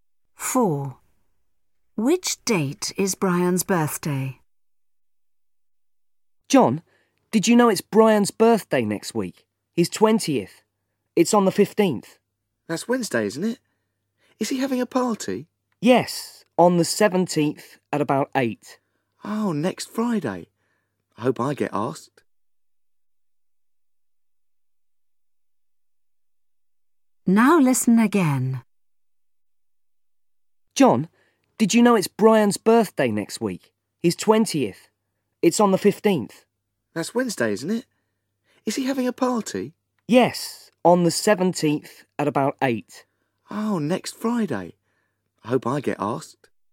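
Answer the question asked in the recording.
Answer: the 15th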